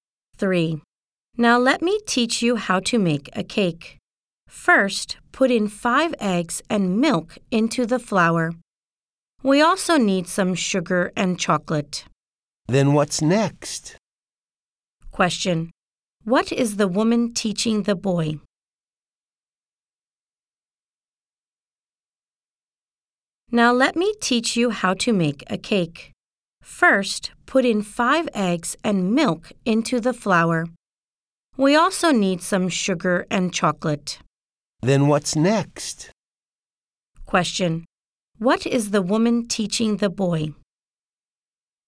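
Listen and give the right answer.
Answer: How to make a cake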